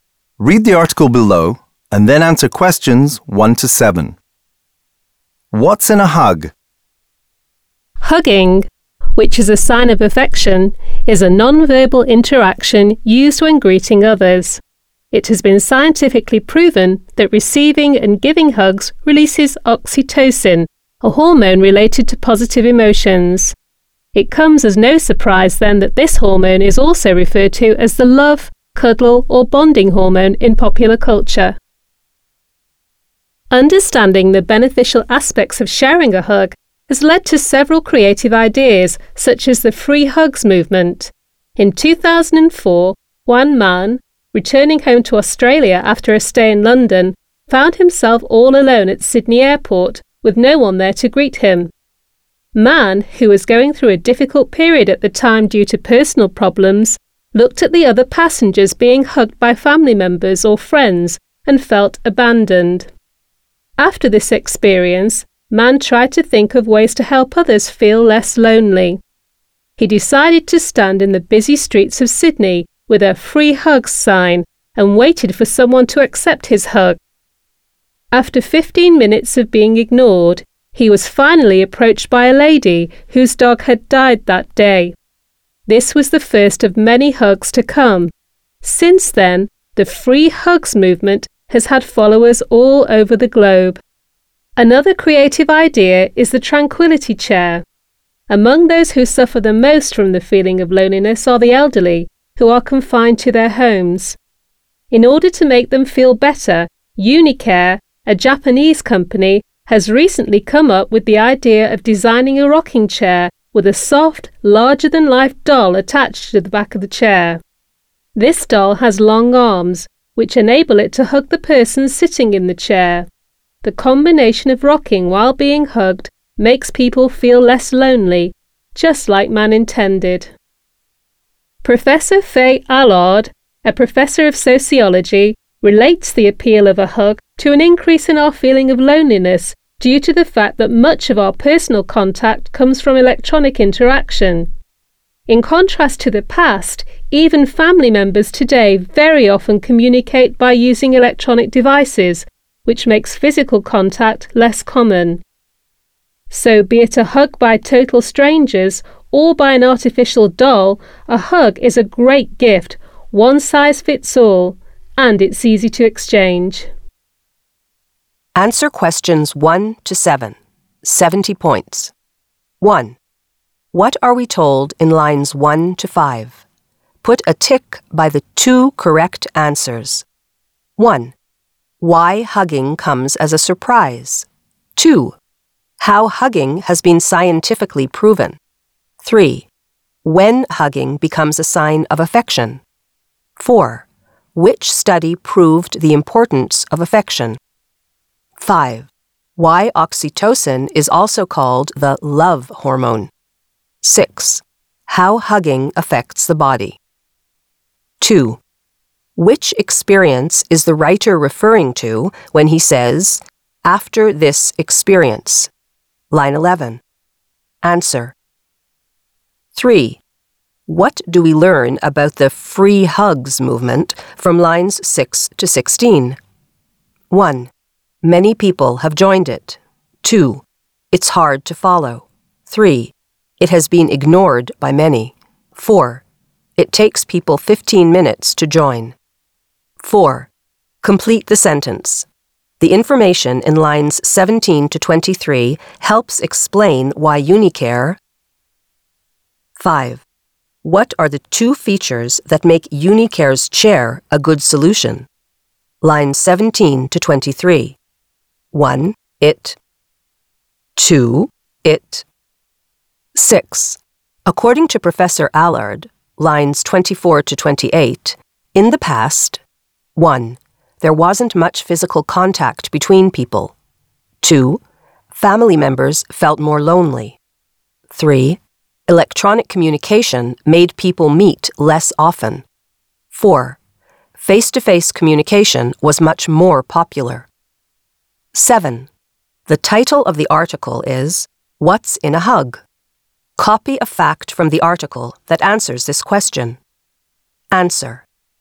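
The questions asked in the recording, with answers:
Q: What are we told in lines 1 to 5?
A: 5: Why oxytocin is also called the love hormone; 6: How hugging affects the body

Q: Which experience is the writer referring to when he says, after this experience?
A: Arriving alone at Sydney Airport with no one to greet him and feeling abandoned

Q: What do we learn about the free hugs movement from lines 6 to 16?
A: 1: Many people have joined it.

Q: Complete the sentence. The information in lines 17 to 23 helps explain why Unicare.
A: designed the tranquility chair: to make lonely elderly people confined to their homes feel better

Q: What are the two features that make Unicare's chair a good solution?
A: It rocks; it hugs the person sitting in it (doll with long arms)

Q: According to Professor Allard, lines 24 to 28, in the past, 1.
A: 4: Face-to-face communication was much more popular.

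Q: The title of the article is, What's in a Hug?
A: Receiving and giving hugs releases oxytocin, a hormone related to positive emotions.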